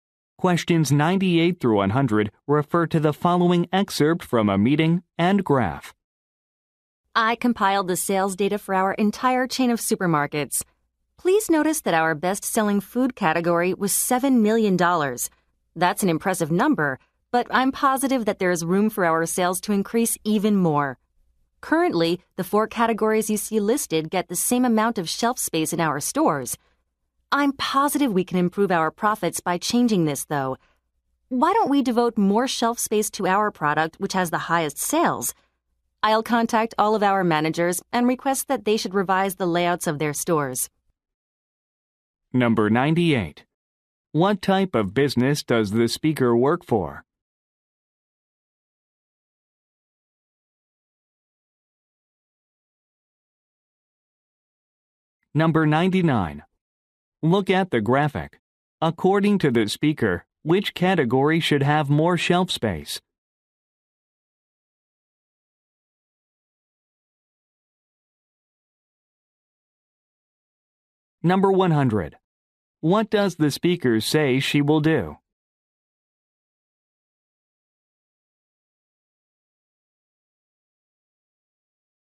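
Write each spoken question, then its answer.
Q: What type of business does the speaker work for?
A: A supermarket chain

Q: What does the speaker say she will do?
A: Contact managers to ask them to revise store layouts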